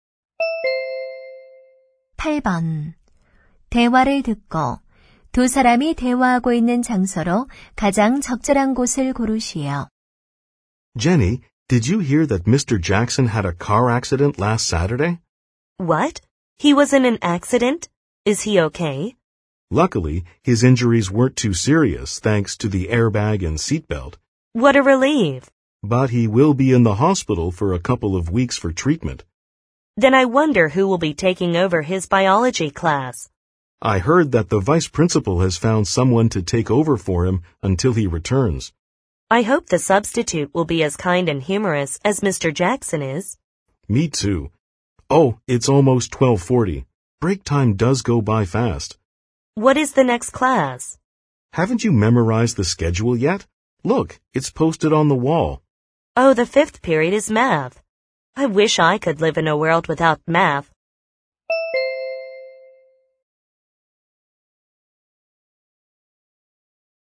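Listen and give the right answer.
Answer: 교실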